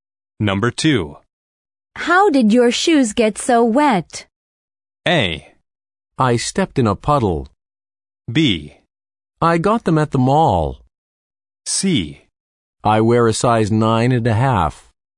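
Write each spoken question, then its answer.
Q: How did your shoes get so wet?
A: A: I stepped in a puddle.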